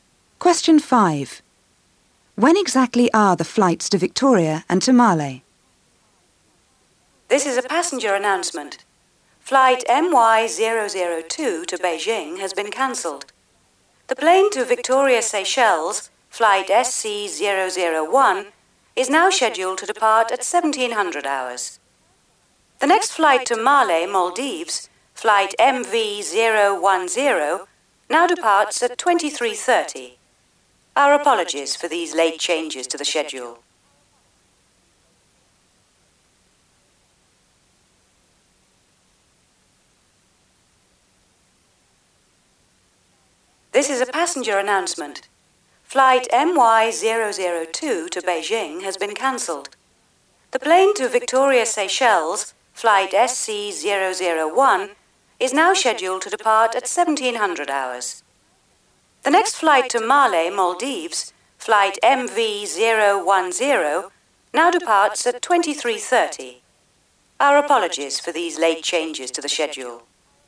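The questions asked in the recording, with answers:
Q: When exactly are the flights to Victoria and to Male?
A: Victoria at 1700 hours; Male at 2330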